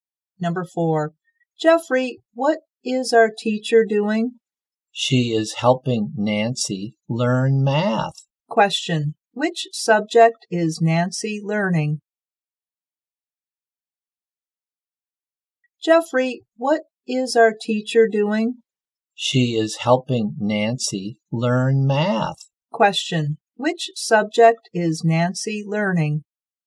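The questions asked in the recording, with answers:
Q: Which subject is Nancy learning?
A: Math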